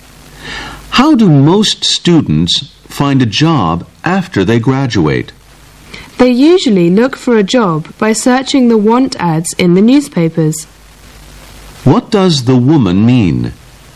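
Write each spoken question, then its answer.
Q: What does the woman mean?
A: Most students find jobs by searching the want ads in newspapers.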